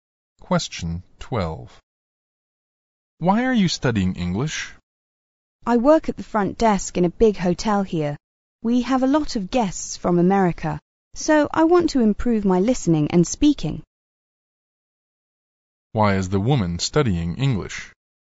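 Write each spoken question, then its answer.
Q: Why is the woman studying English?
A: To improve her listening and speaking for the American guests at the hotel where she works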